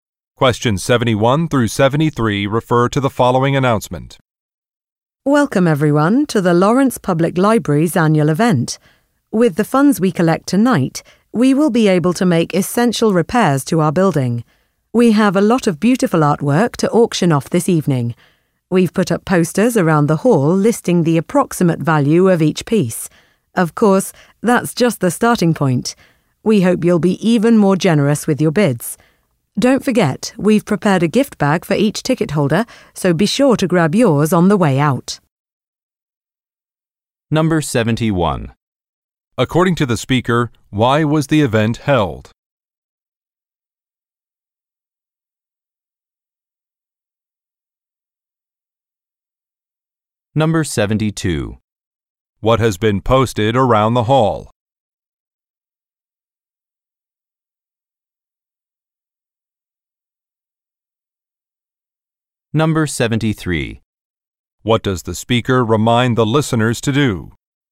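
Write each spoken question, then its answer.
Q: According to the speaker, why was the event held?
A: To raise funds for library repairs

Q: What has been posted around the hall?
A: Posters listing approximate values of artwork

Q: What does the speaker remind the listeners to do?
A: Pick up a gift bag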